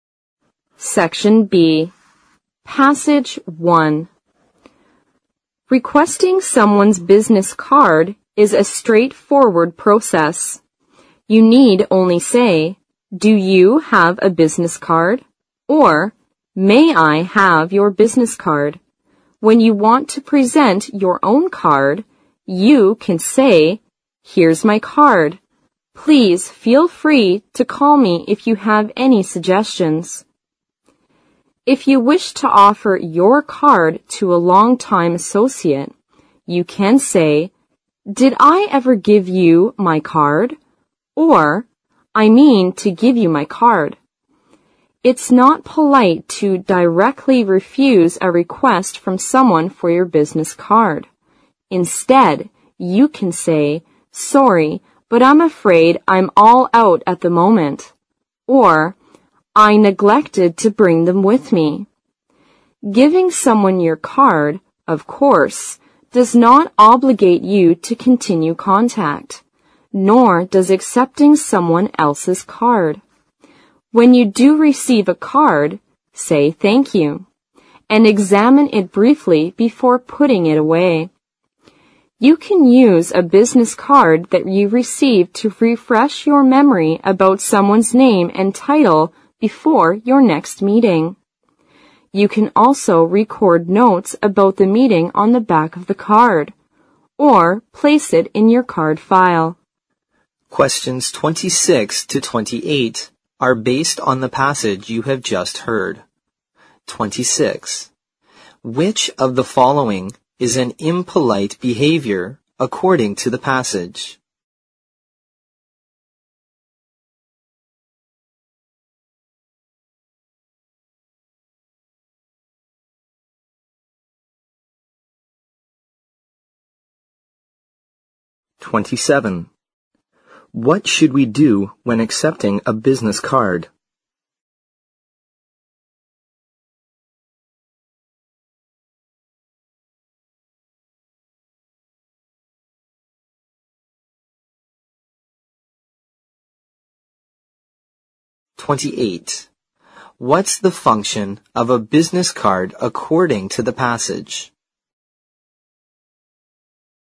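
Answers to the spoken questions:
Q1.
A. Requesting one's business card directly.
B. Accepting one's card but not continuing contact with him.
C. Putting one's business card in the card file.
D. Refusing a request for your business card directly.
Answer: D. Refusing a request for your business card directly.
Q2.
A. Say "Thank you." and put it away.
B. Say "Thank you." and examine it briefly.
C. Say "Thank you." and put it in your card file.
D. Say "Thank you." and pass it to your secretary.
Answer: B. Say "Thank you." and examine it briefly.
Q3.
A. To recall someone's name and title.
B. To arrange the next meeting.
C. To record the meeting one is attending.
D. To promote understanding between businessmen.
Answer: A. To recall someone's name and title.

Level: 四级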